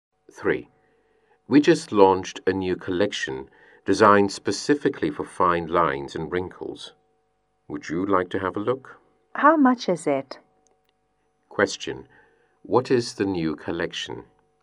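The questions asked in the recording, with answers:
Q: What is the new collection?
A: Products for fine lines and wrinkles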